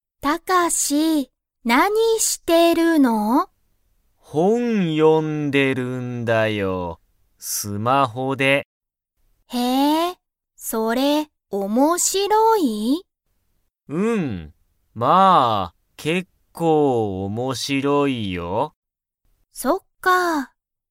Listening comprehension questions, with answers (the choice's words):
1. タカシが読(よ)んでる本(ほん)は、_____。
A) 面白(おもしろ)い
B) 新(あたら)しい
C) 速(はや)い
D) 高(たか)い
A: 面白(おもしろ)い

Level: Level 1